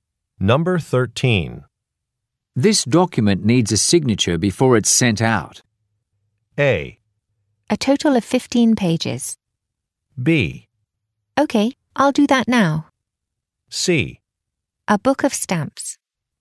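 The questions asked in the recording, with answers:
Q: This document needs a signature before it's sent out.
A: B: Okay, I'll do that now.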